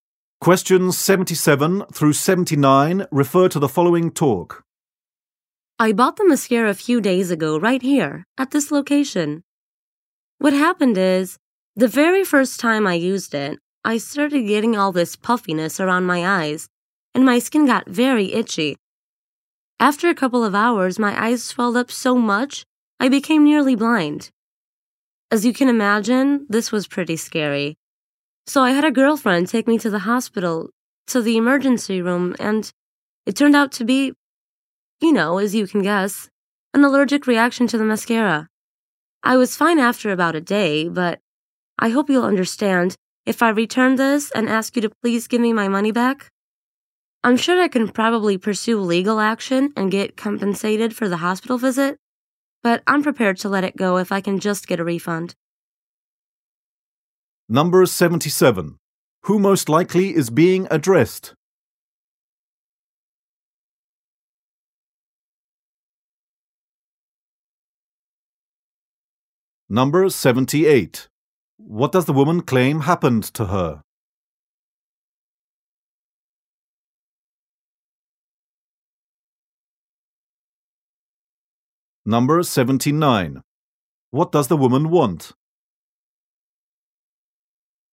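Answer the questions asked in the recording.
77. A store clerk
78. She had an allergic reaction to the mascara
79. A refund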